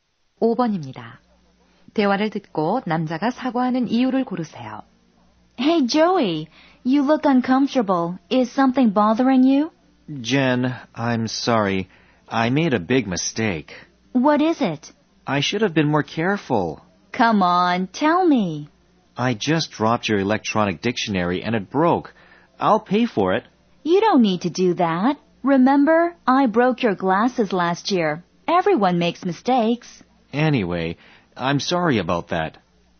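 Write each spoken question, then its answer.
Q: 대화를 듣고 남자가 사과하는 이유를 고르세요.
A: 여자의 전자사전을 떨어뜨려 망가뜨려서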